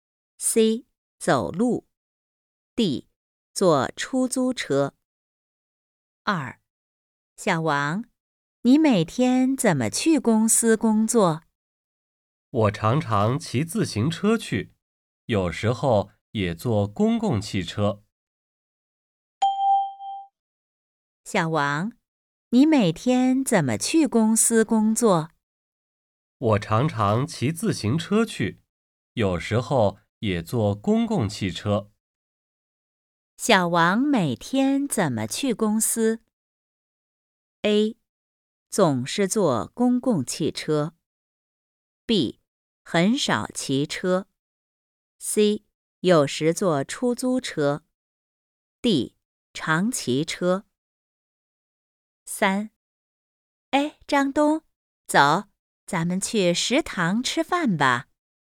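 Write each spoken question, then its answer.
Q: 小王每天怎么去公司?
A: D: 常骑车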